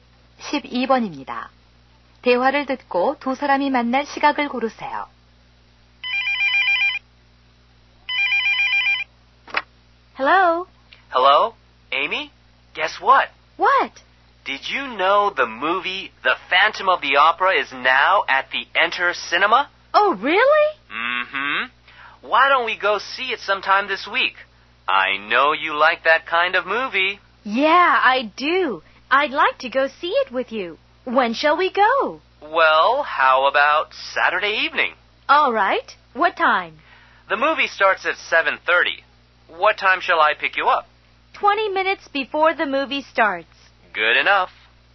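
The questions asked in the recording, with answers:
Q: 대화를 듣고 두 사람이 만날 시각을 고르세요.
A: 7시 10분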